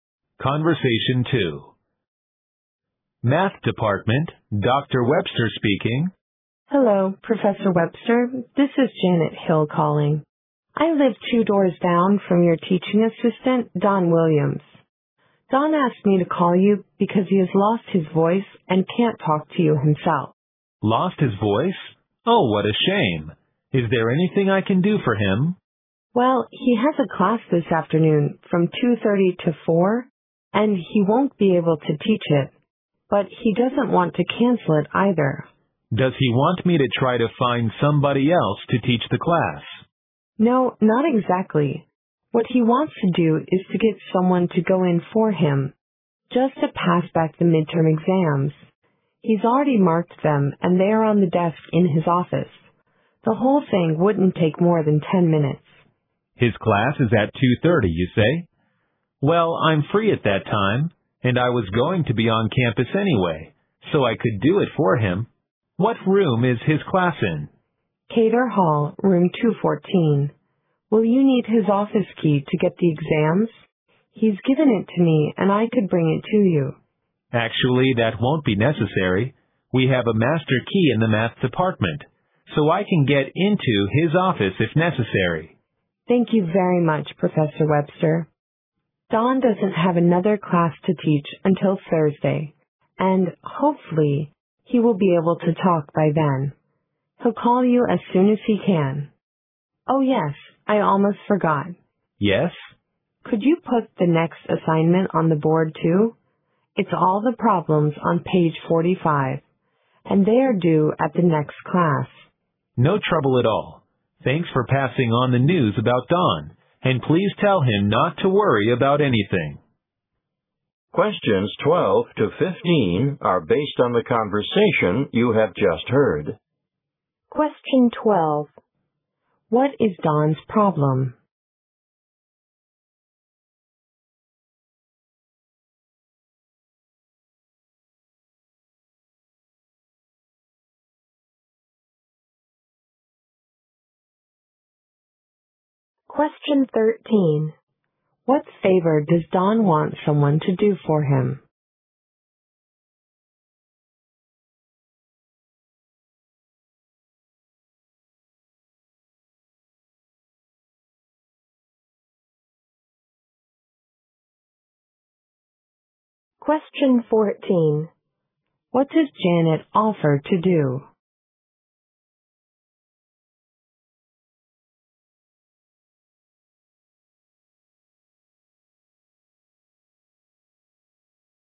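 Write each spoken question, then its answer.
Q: What is Don's problem?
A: He has lost his voice.

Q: What favor does Don want someone to do for him?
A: Go to his class and pass back the midterm exams.

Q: What does Janet offer to do?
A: Bring Don's office key to Professor Webster.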